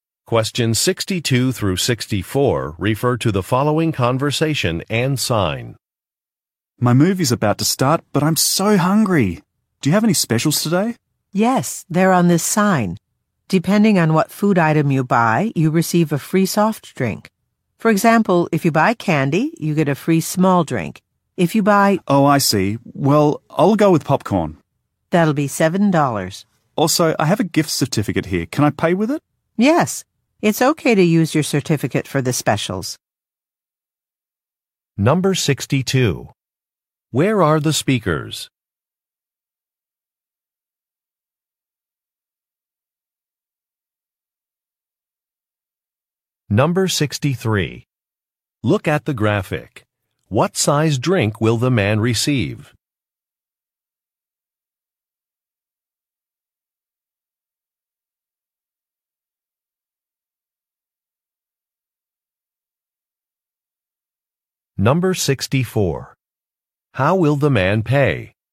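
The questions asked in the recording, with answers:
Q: Where are the speakers?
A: At a movie theater

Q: How will the man pay?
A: With a gift certificate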